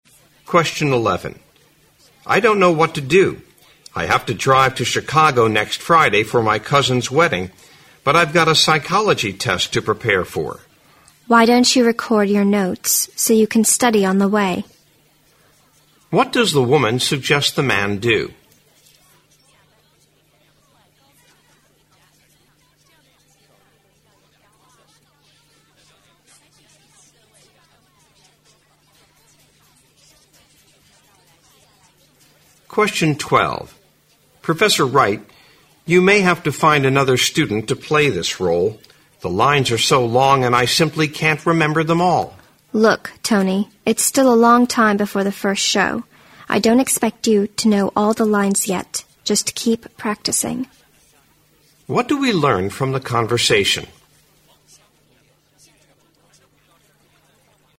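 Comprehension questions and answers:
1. What does the woman suggest the man do?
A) Cancel the trip to prepare for the test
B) Review his notes once he arrives in Chicago.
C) Listen to the recorded notes while driving.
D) Prepare for the test after the wedding.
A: Listen to the recorded notes while driving.

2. What do we learn from the conversation?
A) The woman will help the man remember the lines.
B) The man lacks confidence in playing the part.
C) The man hopes to change his role in the play.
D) The woman will prompt the man during the show.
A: The man lacks confidence in playing the part.

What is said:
M: I don't know what to do. I have to drive to Chicago next Friday for my cousin's wedding, but I have got a Psychology test to prepare for.
W: Why don't you record your notes so you can study on the way?
Q: What does the woman suggest the man do?
M: Professor Wright, you may have to find another student to play this role, the lines are so long and I simply can't remember them all.
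W: Look, Tony. It is still a long time before the first show. I don't expect you to know all the lines yet. Just keep practicing.
Q: What do we learn from the conversation?

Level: 六级

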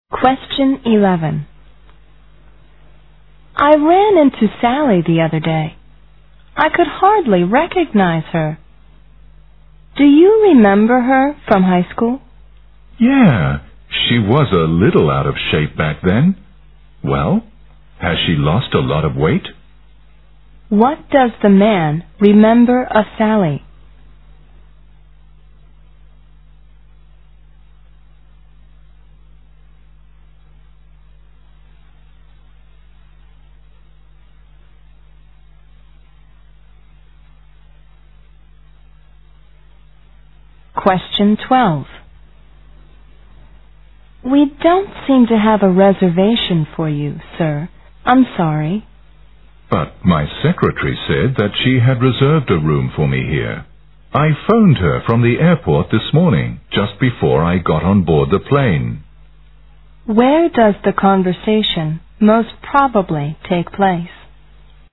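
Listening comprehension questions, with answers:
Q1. What does the man remember of Sally?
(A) She used to be in poor health.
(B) She was popular among boys.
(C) She was somewhat overweight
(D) She didn't do well at high school.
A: She was somewhat overweight

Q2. Where does the conversation most probably take place?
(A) At he airport.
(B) In a restaurant.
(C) In a booking office.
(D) At the hotel reception.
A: At the hotel reception.

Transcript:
W: I ran into Sally the other day. I could hardly recognize her. Do you remember her from high school?
M: Yeah, she was a little out of shape back then. Well, has she lost a lot of weight?
Q: What does the man remember of Sally?
W: We don't seem to have a reservation for you, sir? I'm sorry.
M: But my secretary said that she had reserved a room for me here. I phoned her from the airport this morning just before I got on board the plane.
Q: Where does the conversation most probably take place?

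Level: 大学英语四级

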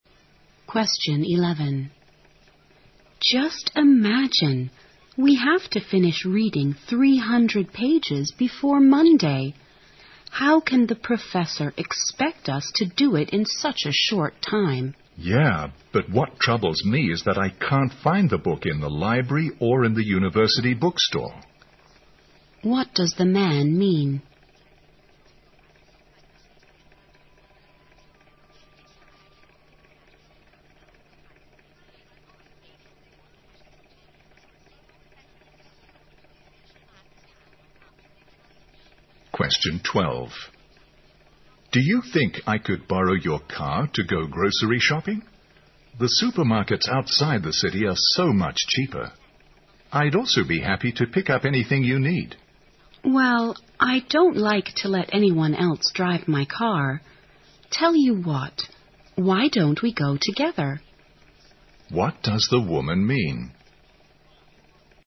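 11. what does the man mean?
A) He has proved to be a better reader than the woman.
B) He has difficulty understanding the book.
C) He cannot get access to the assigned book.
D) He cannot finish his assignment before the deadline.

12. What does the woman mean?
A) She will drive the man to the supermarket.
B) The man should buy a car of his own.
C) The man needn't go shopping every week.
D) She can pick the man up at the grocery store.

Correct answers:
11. He cannot get access to the assigned book.
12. She will drive the man to the supermarket.

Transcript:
W: Just imagine we have to finish reading 300 pages before Monday, how can the professor expect us to do it in such a short time?
M: Yeah, but what troubles me is that I can't find the book in the library or in the university bookstore.
Q: what does the man mean?
M: Do you think I could borrow your car to go grocery shopping? The supermarkets outside the city are so much cheaper. 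I'd also be happy to pick up anything you need.
W: Wow, I don't like to let anyone else to drive my car. Tell you what, why don't we go together?
Q: What does the woman mean?

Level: 大学英语四级

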